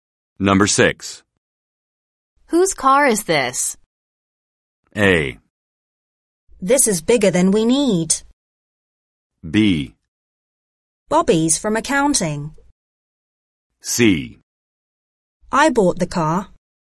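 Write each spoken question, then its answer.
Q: Whose car is this?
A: B: Bobby's from accounting.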